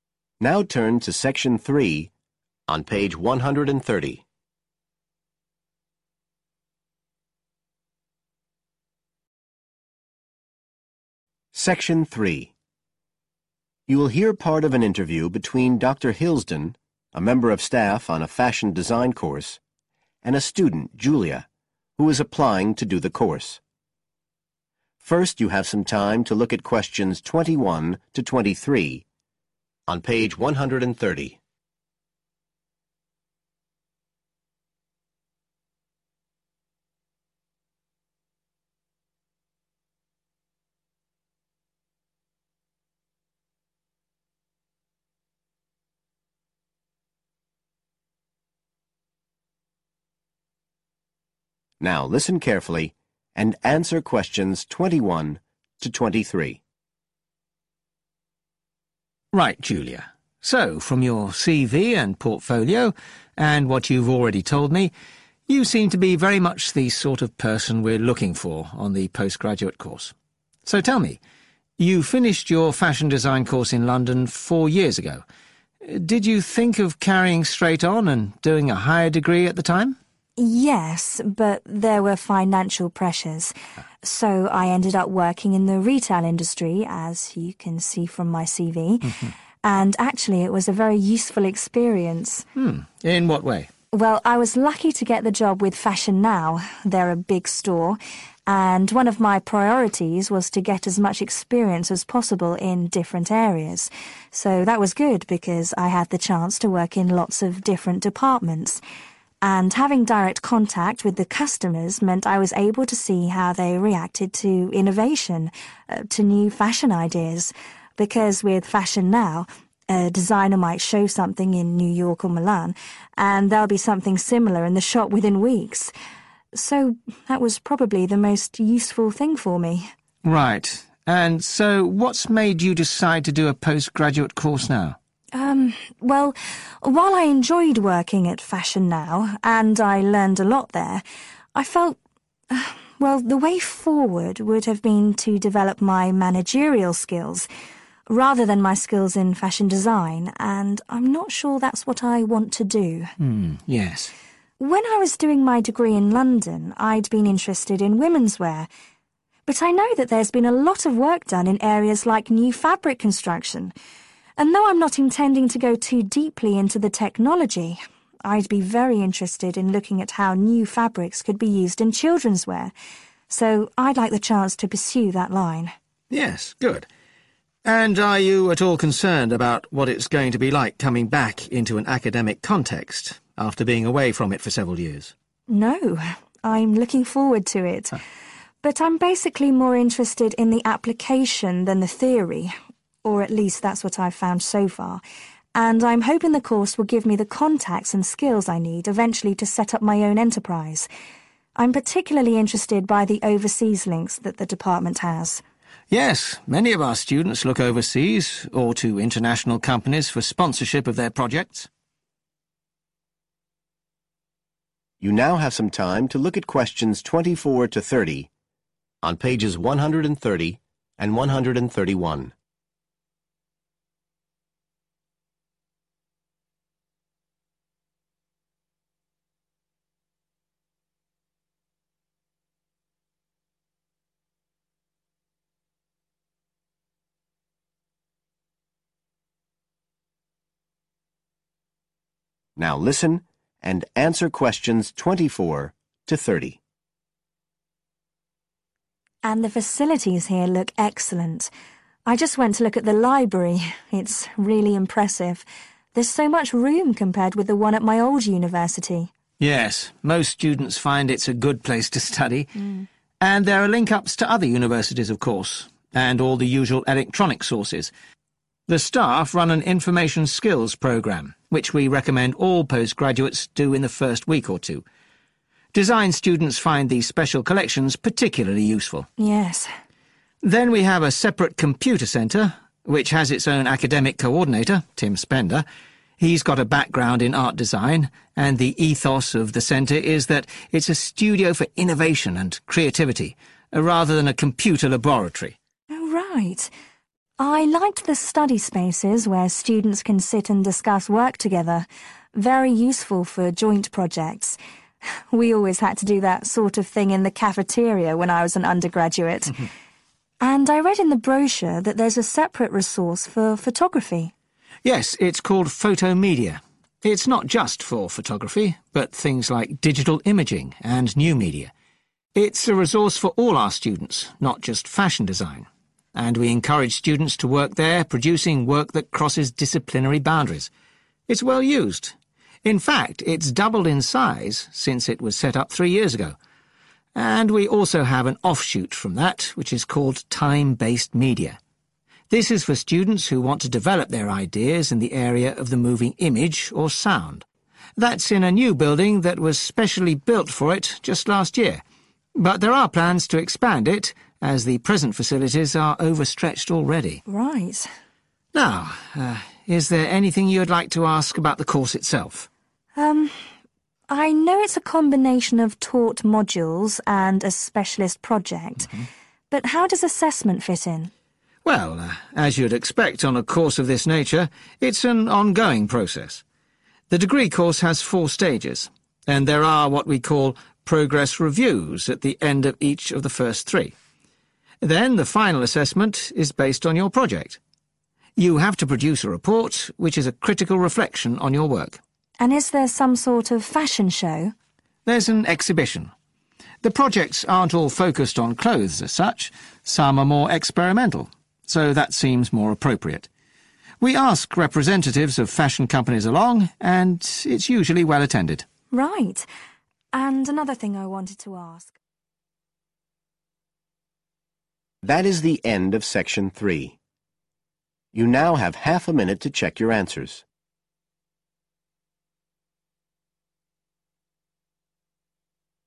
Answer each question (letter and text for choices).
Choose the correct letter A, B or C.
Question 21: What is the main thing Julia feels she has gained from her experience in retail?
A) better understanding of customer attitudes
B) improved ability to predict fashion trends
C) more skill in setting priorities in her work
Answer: A) better understanding of customer attitudes

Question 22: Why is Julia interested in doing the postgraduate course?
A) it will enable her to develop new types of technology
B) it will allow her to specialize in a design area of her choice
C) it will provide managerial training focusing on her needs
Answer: B) it will allow her to specialize in a design area of her choice

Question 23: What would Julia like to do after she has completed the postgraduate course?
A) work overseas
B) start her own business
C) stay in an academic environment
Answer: B) start her own business

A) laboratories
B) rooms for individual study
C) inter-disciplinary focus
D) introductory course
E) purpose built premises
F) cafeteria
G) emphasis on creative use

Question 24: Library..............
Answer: D) introductory course

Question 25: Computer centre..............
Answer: G) emphasis on creative use

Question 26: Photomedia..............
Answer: C) inter-disciplinary focus

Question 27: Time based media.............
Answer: E) purpose built premises

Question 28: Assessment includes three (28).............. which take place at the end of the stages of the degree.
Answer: progress reviews

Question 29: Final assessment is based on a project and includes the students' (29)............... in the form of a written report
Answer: (critical) reflection

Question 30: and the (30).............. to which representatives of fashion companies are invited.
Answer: exhibition